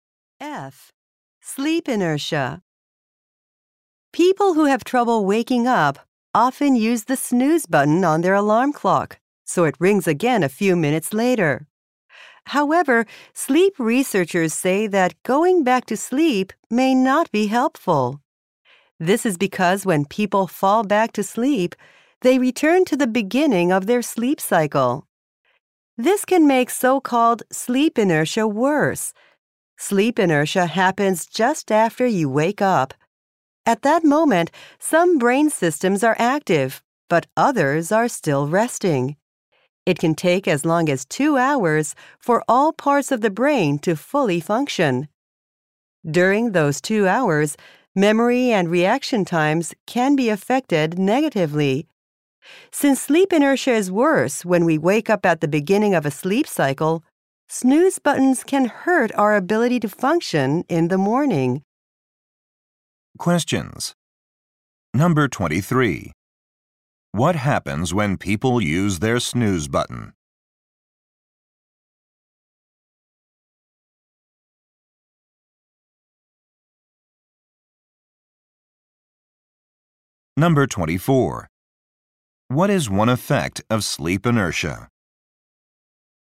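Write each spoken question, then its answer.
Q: What happens when people use their snooze button?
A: They go back to the beginning of their sleep cycle, which makes sleep inertia worse.

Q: What is one effect of sleep inertia?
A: Memory and reaction times can be affected negatively.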